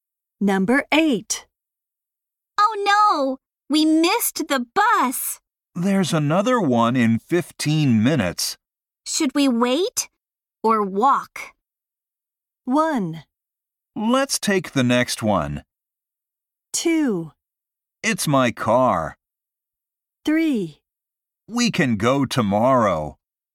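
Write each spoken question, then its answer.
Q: Should we wait or walk?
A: 1: Let's take the next one.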